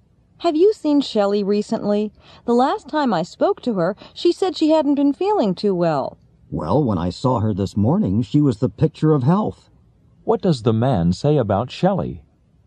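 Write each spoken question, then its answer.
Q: What does the man say about Shelley?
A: She looked very healthy this morning.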